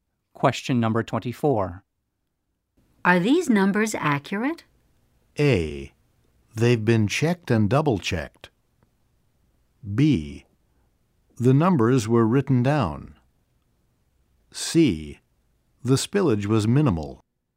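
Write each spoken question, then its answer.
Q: Are these numbers accurate?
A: A: They've been checked and double-checked.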